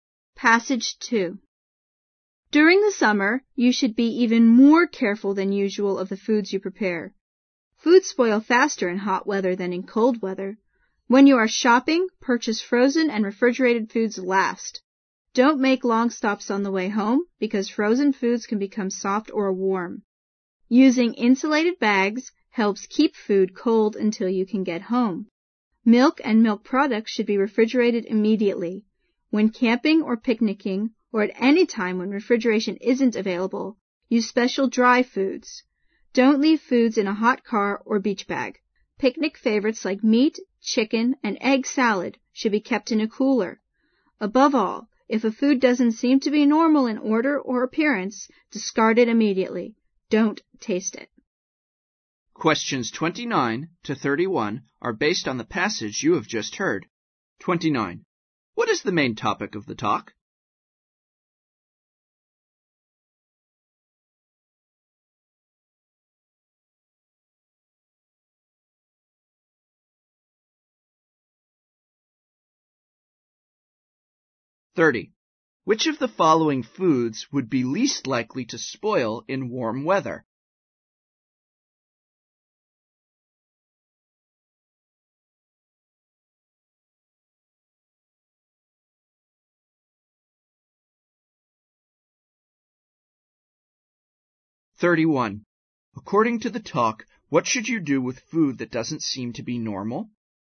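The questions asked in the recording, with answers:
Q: What is the main topic of the talk?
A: Keeping food safe in summer

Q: According to the talk, what should you do with food that doesn't seem to be normal?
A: Throw it away immediately without tasting it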